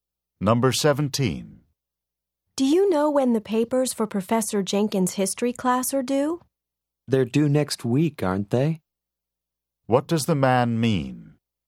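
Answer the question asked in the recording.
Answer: He thinks the papers are due next week.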